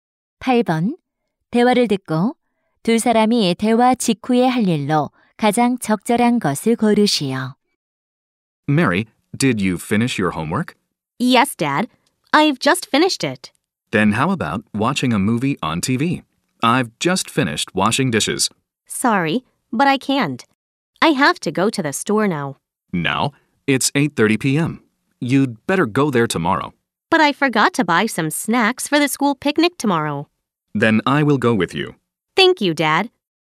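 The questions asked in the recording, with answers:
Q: 대화를 듣고 두 사람이 대화 직후에 할 일로 가장 적절한 것을 고르시오.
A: 가게에 가서 소풍 간식 사기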